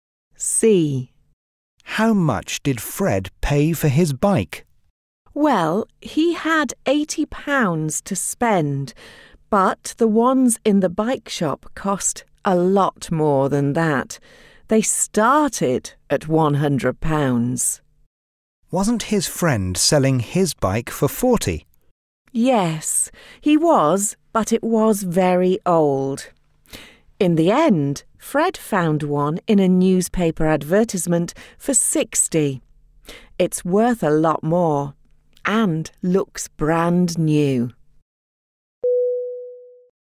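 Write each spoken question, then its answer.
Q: How much did Fred pay for his bike?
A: £60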